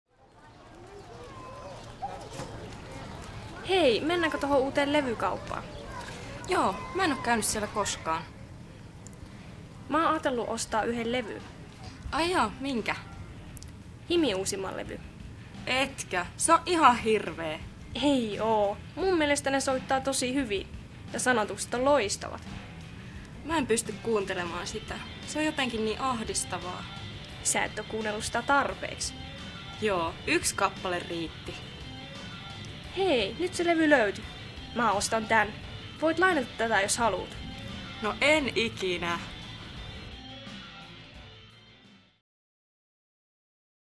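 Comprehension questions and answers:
Klikkaa oikeaa väittämää kuuntelun jälkeen.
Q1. Tytöt menevät tuttuun levykauppaan.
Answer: ei

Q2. Molemmat tytöt pitävät HIMin musiikista.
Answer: ei

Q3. Molemmat ovat kuunnelleet paljon HIMin musiikkia.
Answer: ei

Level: Suomi 2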